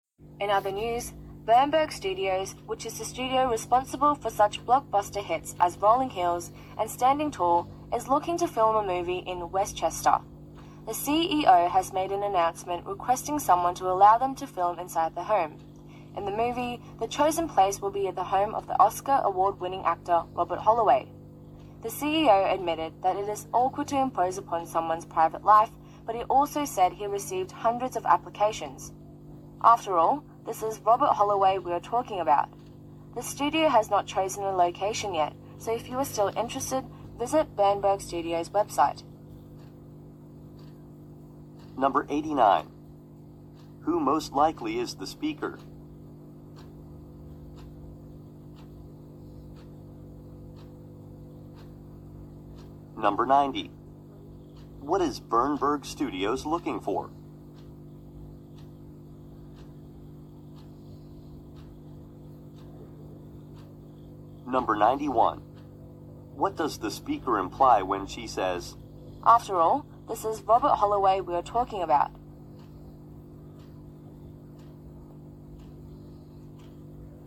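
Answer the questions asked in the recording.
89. A news reporter
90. A private home to film a movie in
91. Many people want to take part because Robert Holloway is a famous actor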